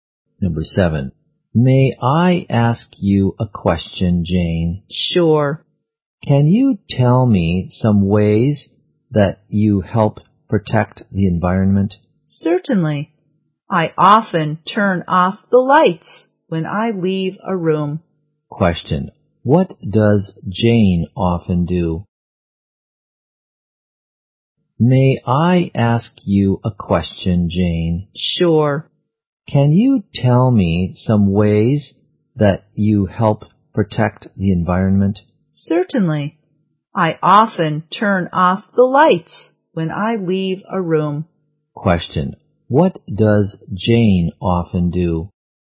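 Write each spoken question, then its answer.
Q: What does Jane often do?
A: Turns off the lights when she leaves a room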